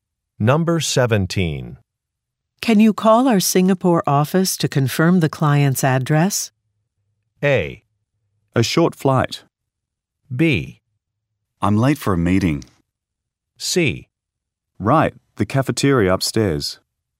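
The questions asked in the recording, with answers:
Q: Can you call our Singapore office to confirm the client's address?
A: B: I'm late for a meeting.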